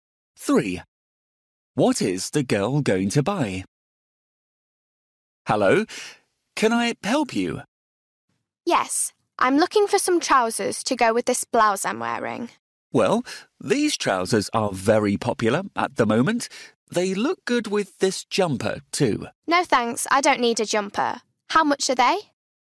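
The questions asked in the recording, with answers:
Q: What is the girl going to buy?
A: trousers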